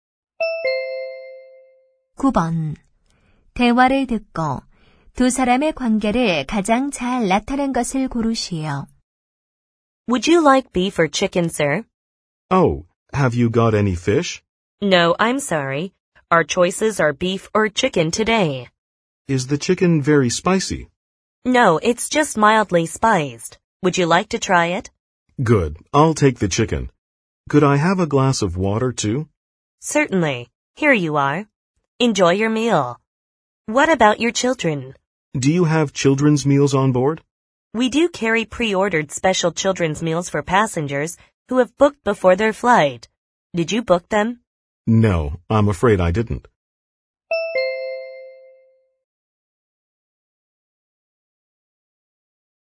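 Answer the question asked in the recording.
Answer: 승무원 - 승객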